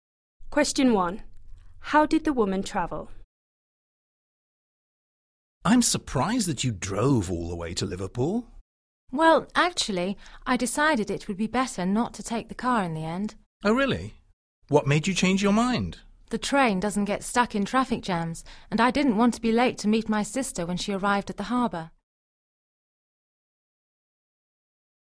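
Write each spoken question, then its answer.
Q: How did the woman travel?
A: By train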